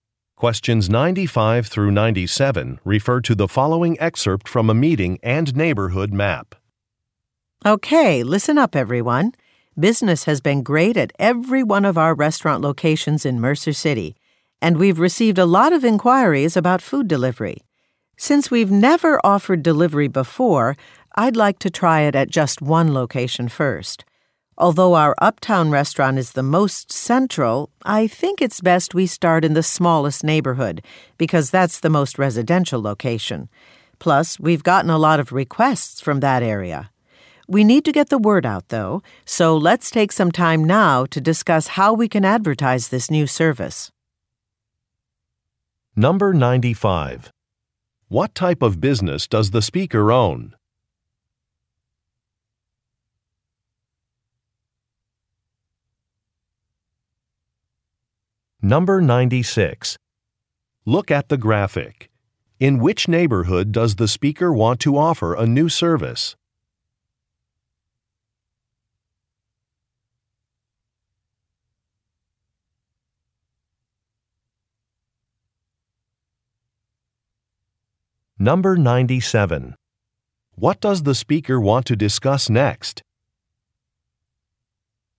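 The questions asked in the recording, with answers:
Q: What type of business does the speaker own?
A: Restaurants

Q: What does the speaker want to discuss next?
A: How to advertise the new delivery service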